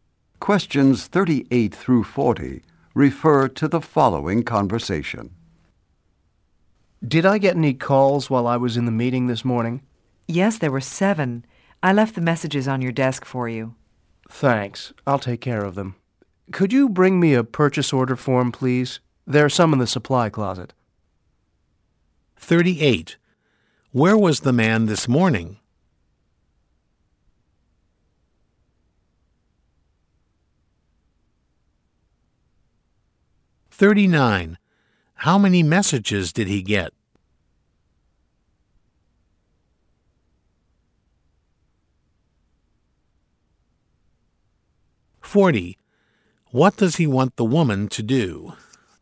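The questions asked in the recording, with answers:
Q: Where was the man this morning?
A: In a meeting

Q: How many messages did he get?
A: Seven

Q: What does he want the woman to do?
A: Bring him a purchase order form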